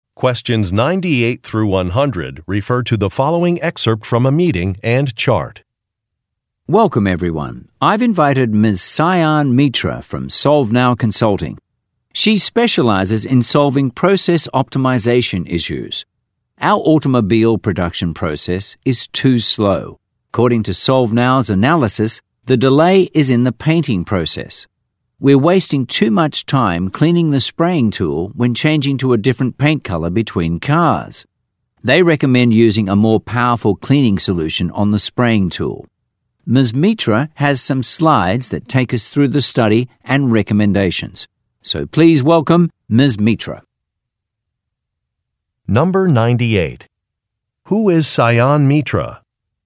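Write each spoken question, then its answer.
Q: Who is Sayan Mitra?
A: A consultant specializing in process optimization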